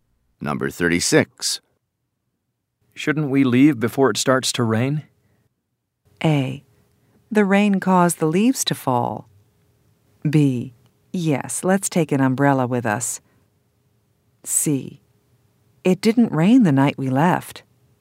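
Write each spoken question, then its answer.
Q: Shouldn't we leave before it starts to rain?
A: B: Yes, let's take an umbrella with us.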